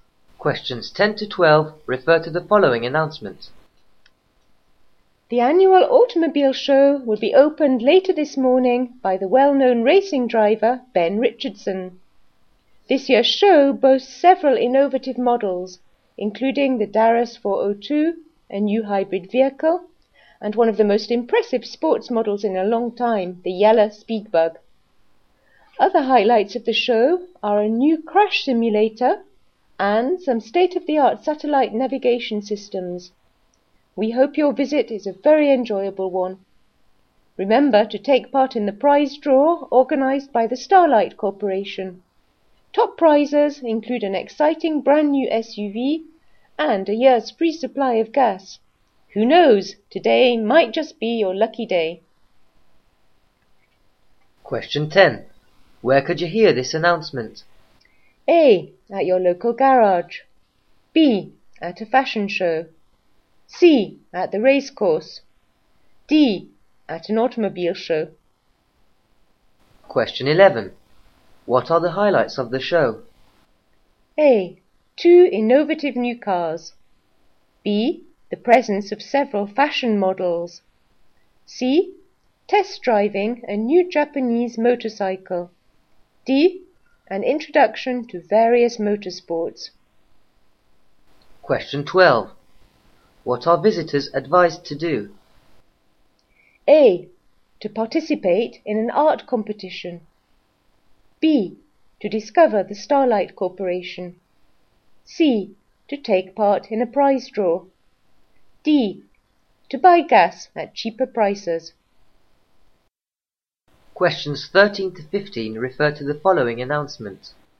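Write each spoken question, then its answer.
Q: Where could you hear this announcement?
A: D: At an automobile show.

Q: What are the highlights of the show?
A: A: Two innovative new cars.

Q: What are visitors advised to do?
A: C: To take part in a prize draw.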